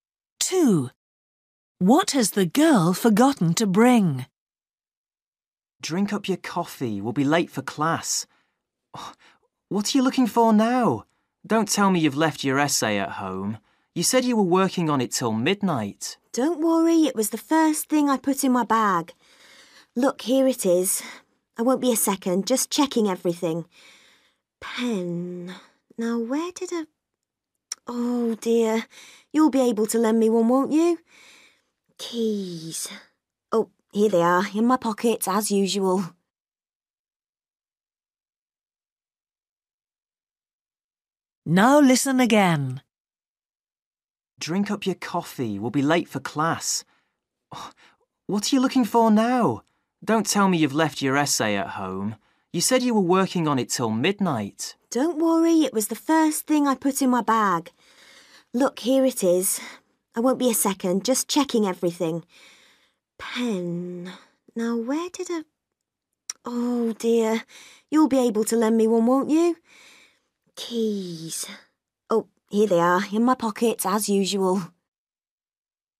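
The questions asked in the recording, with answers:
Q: What has the girl forgotten to bring?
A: A pen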